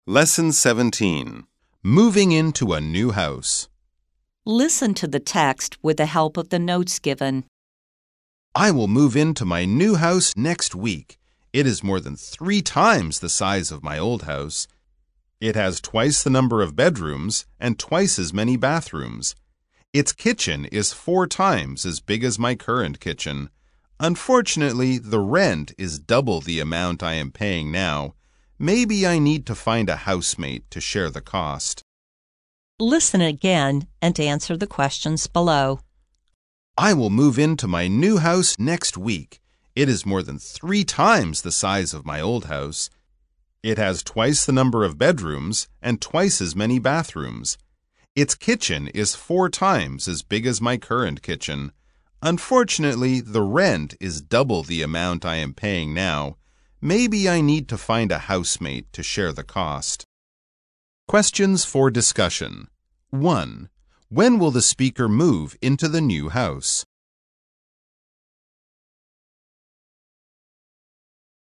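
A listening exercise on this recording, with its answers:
再次聆聽並回答問題 Listen again and answer the questions below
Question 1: When will the speaker move into the new house?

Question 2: Is the new house bigger than the old one?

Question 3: Is the rent for the new house cheaper than the old one?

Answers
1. Next week.
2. Yes, more than three times the size.
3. No, it is double.

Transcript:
I will move into my new house next week! It is more than three times the size of my old house. It has twice the number of bedrooms and twice as many bathrooms. Its kitchen is four times as big as my current kitchen. Unfortunately, the rent is double the amount I am paying now. Maybe I need to find a housemate to share the cost.

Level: 中階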